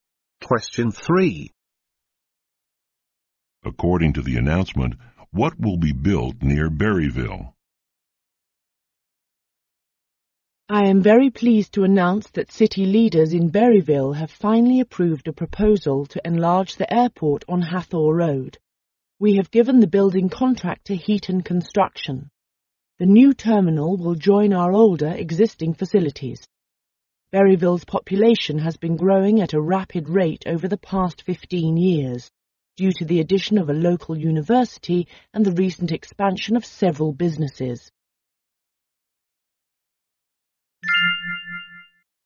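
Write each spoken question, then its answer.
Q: According to the announcement, what will be built near Berryville?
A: A new airport terminal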